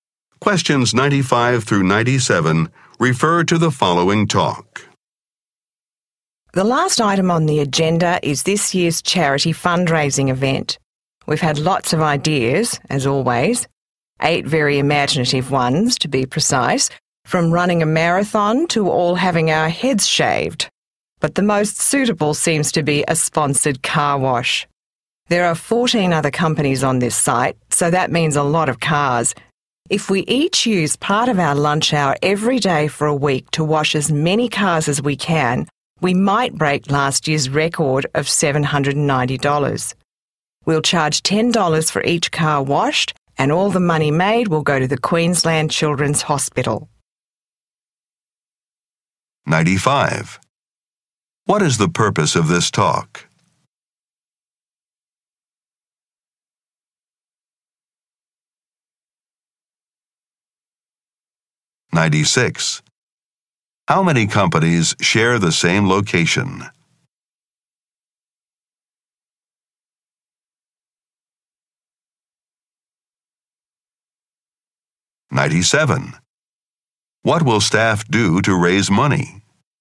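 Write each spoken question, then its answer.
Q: What is the purpose of this talk?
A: To decide on the charity fundraising event

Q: What will staff do to raise money?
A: Wash cars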